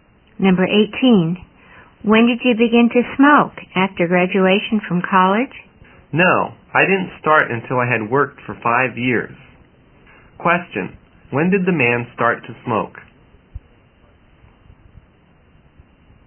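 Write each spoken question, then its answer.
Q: when did the man start to smoke?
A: After he had worked for 5 years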